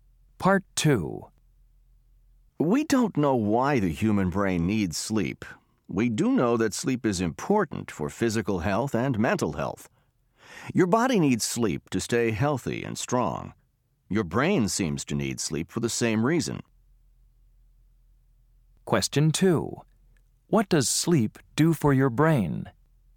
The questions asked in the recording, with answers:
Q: What does sleep do for your brain?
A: Sleep helps your brain stay healthy.